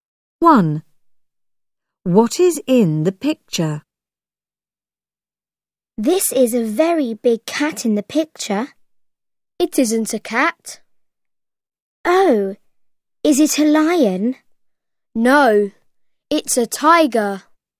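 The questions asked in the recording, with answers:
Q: What is in the picture?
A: a tiger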